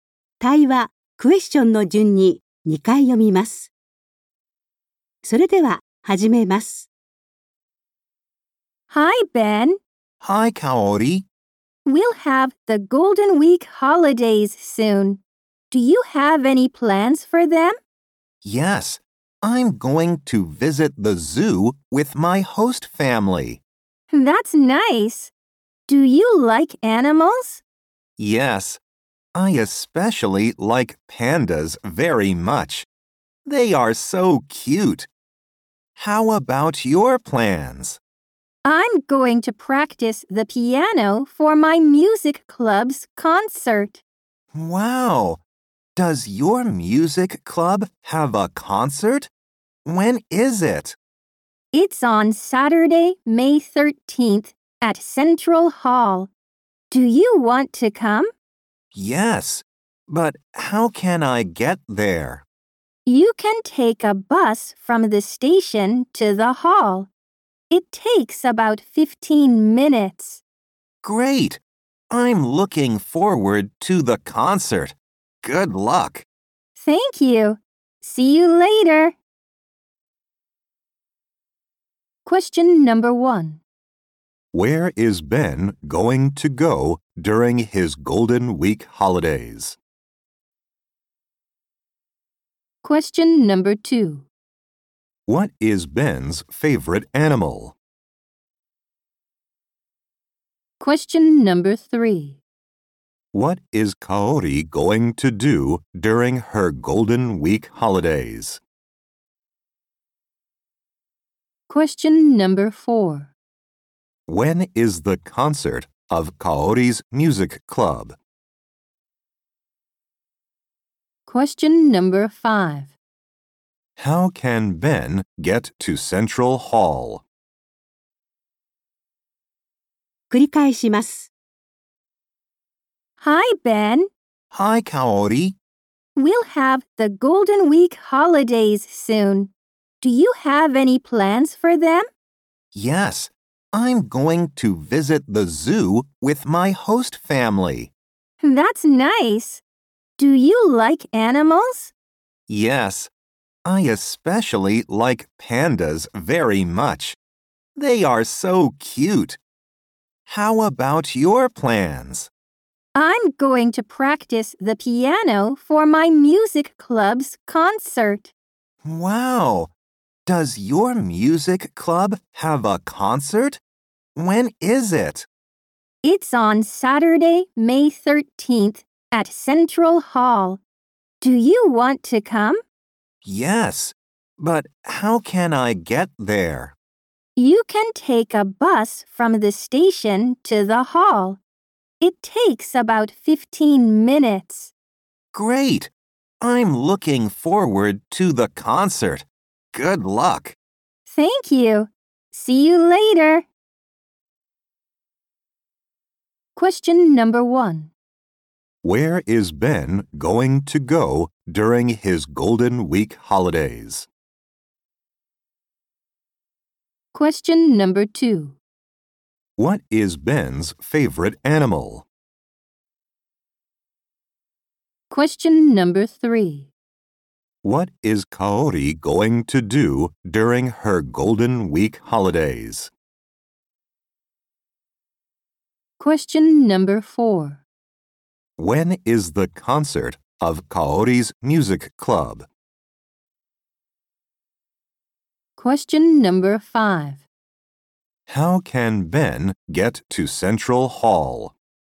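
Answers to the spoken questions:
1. To the zoo
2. Pandas
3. Practice the piano for her music club's concert
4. Saturday, May 13th
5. By bus from the station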